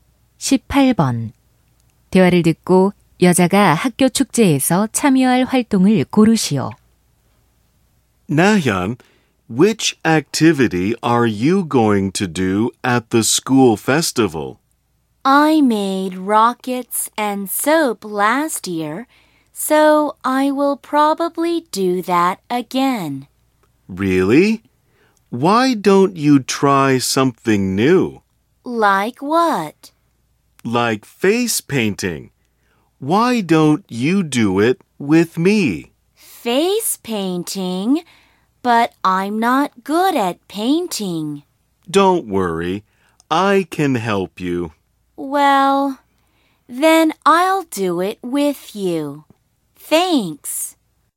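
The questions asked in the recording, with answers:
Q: 대화를 듣고 여자가 학교 축제에서 참여할 활동을 고르시오.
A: 페이스 페인팅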